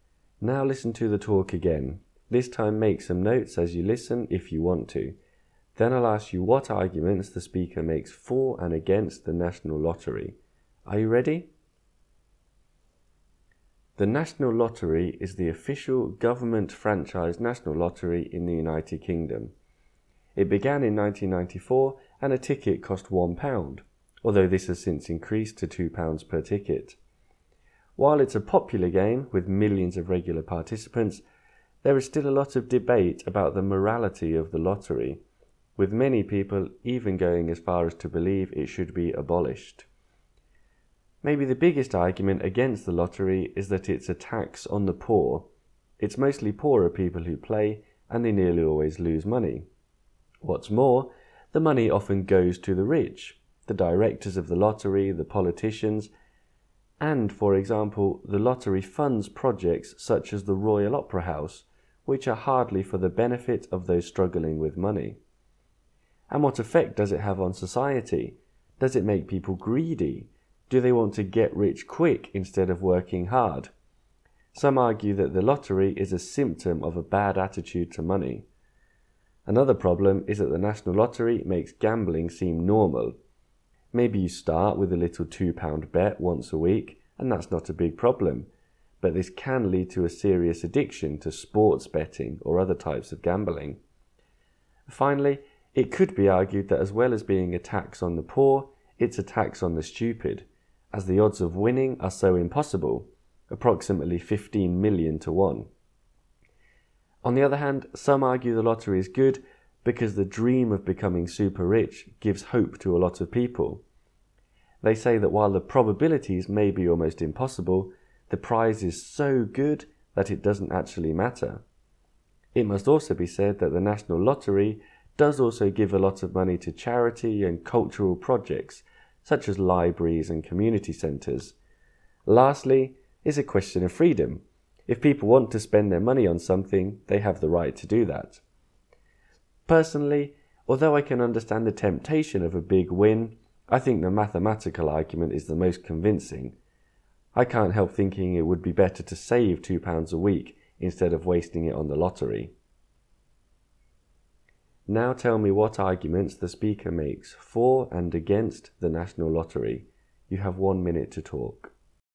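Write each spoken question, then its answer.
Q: Now tell me what arguments the speaker makes for and against the National Lottery.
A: Against: it is a tax on the poor; the money often goes to the rich; it may make people greedy; it makes gambling seem normal and can lead to addiction; the odds of winning are about 15 million to one. For: it gives people hope; it gives money to charity and cultural projects; people have the freedom to spend their money as they like.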